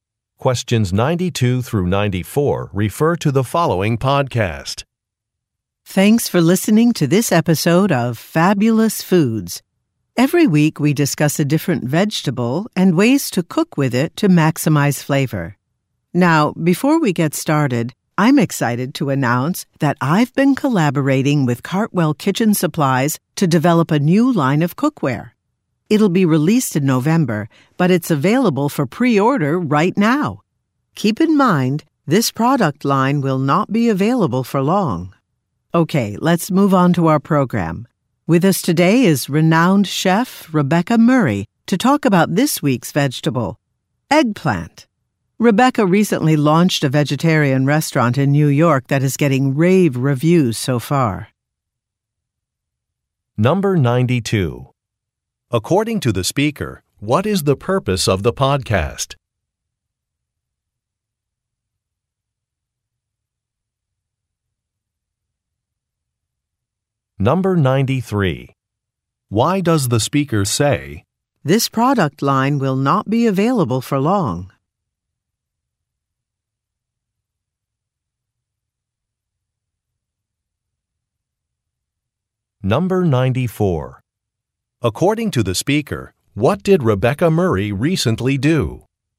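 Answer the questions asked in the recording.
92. To discuss a different vegetable each week and ways to cook it
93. To encourage listeners to pre-order the cookware soon
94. She opened a vegetarian restaurant in New York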